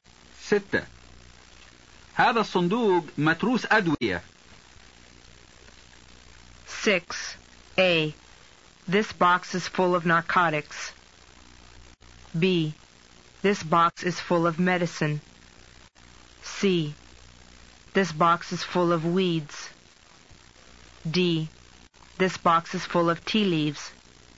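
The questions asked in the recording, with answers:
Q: هذا الصندوق متروس أدوية.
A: B: This box is full of medicine.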